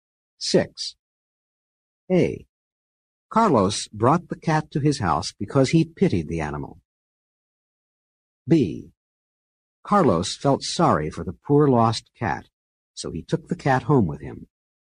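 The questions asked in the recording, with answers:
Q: A. Carlos brought the cat to his house because he pitied the animal.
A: same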